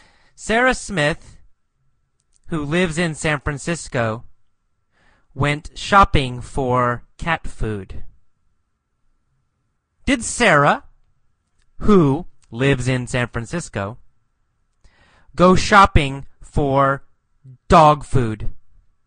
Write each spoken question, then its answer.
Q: Did Sarah, who lives in San Francisco, go shopping for dog food?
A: No. Sarah, who lives in San Francisco, didn't go shopping for dog food.